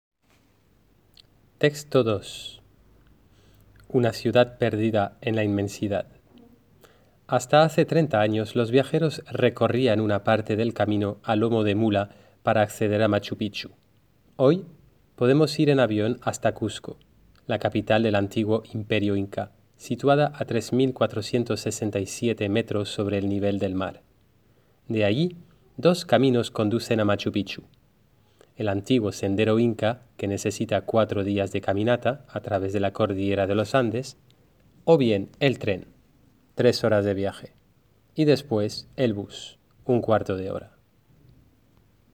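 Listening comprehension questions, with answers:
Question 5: ¿Cómo se iba a Machu Picchu hace 30 años?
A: Se recorría una parte del camino a lomo de mula

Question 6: ¿Cuáles son las soluciones hoy para ir a visitar el Machu Picchu?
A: Avión hasta Cusco, luego el sendero Inca (4 días de caminata) o el tren (3 horas) y el bus (1/4 de hora)

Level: Classe de 3ème classique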